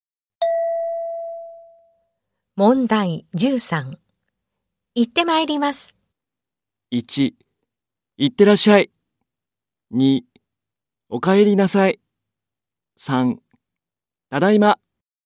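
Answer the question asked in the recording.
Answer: 1: 行ってらっしゃい。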